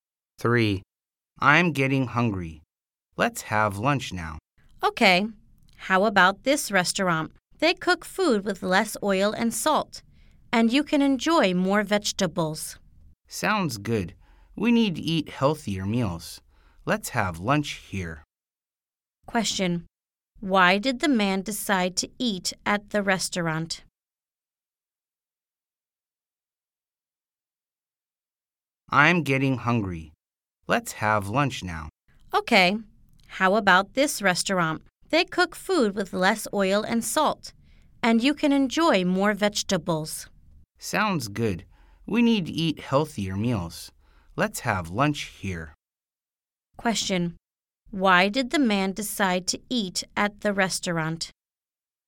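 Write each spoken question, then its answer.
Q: Question. Why did the man decide to eat at the restaurant?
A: They cook food with less oil and salt and more vegetables; it's healthier.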